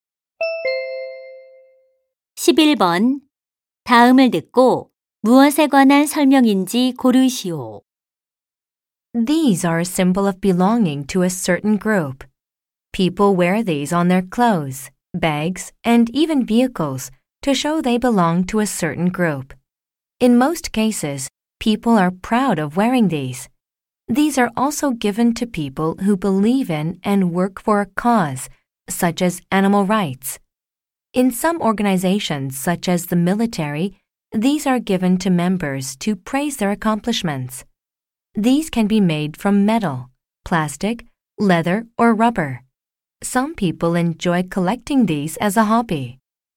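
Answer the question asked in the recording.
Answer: 배지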